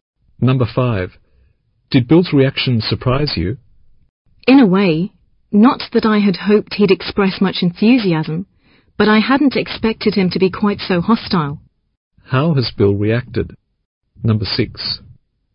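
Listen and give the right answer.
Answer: He was very hostile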